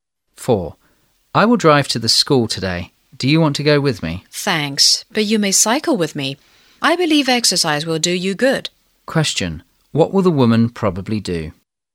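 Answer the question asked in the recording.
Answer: Ride her bike to school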